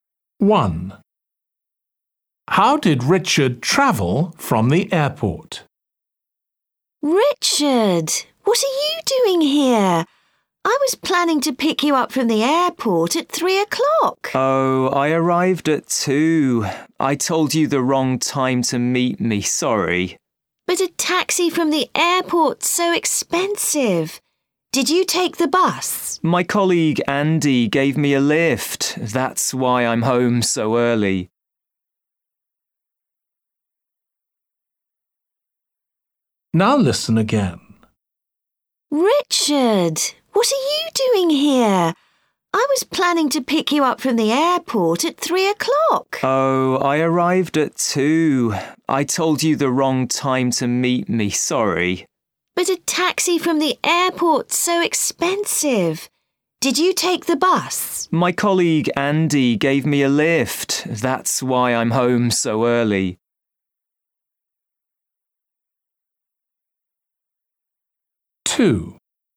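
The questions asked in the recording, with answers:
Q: How did Richard travel from the airport?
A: By car, his colleague Andy gave him a lift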